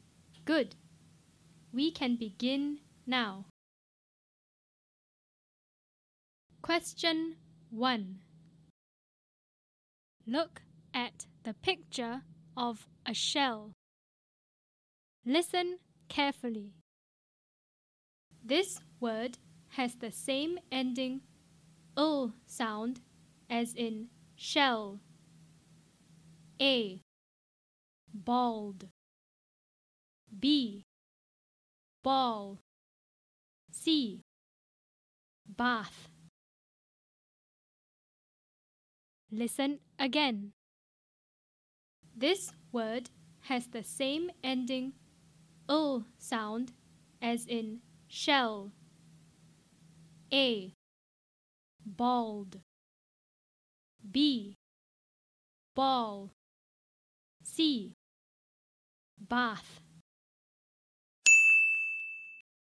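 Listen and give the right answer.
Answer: B: Ball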